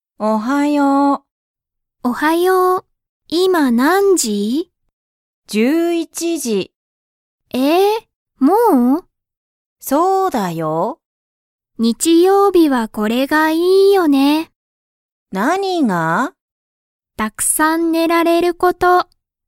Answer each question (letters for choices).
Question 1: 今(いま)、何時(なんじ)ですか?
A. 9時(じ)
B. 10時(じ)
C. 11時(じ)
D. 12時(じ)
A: C